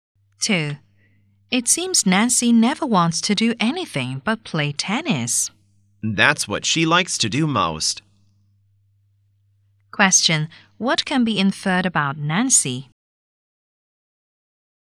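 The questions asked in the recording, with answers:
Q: What can be inferred about Nancy?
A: She likes playing tennis most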